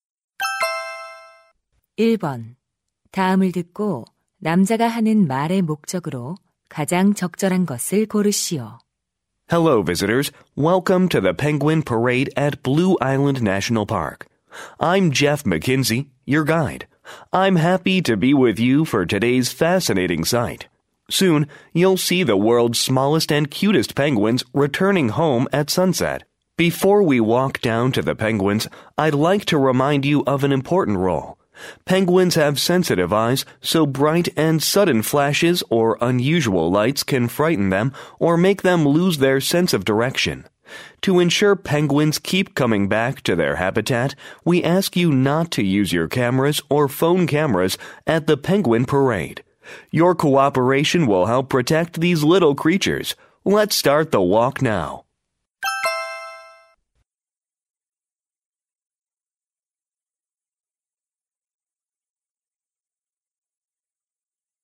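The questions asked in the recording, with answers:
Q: 다음을 듣고 남자가 하는 말의 목적으로 가장 적절한 것을 고르시오.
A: 펭귄 퍼레이드에서 카메라 사용 금지를 당부하려고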